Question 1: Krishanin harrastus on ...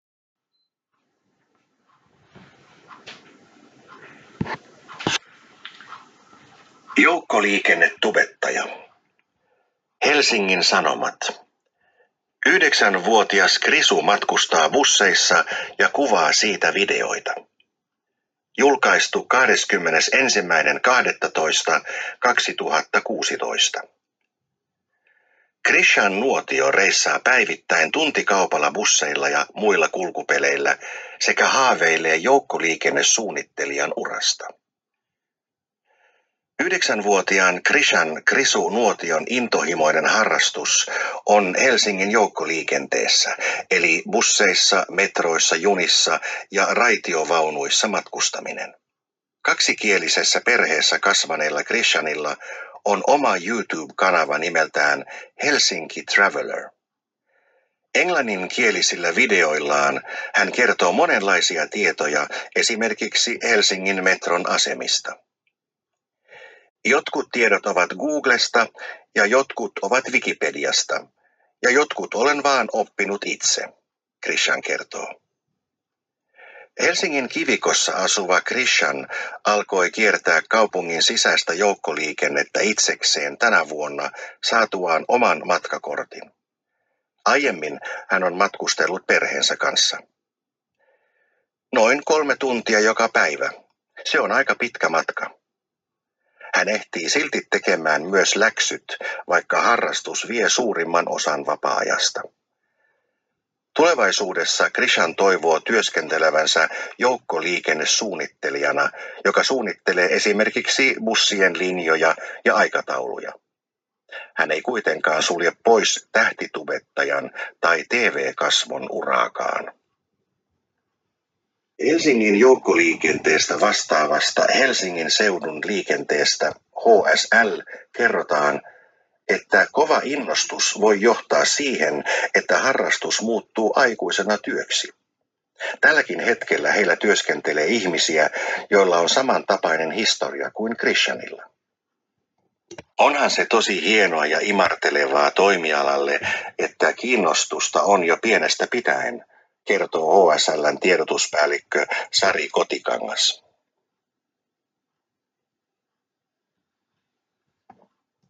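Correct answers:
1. matkustaa Helsingin joukkoliikenteessä (busseissa, metroissa, junissa ja raitiovaunuissa)

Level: 3. lk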